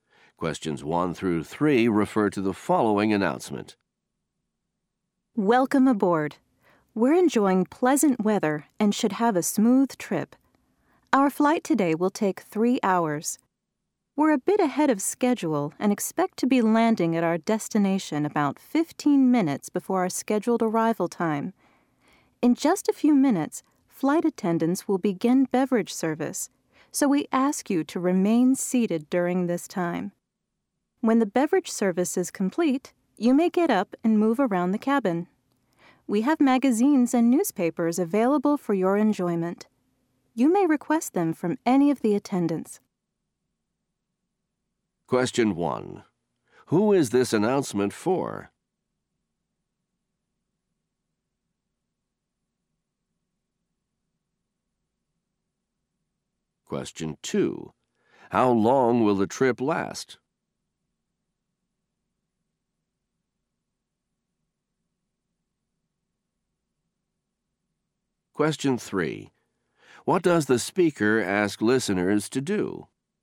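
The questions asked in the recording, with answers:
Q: Who is this announcement for?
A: Airplane passengers

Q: How long will the trip last?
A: 3 hours

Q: What does the speaker ask listeners to do?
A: Remain seated during the beverage service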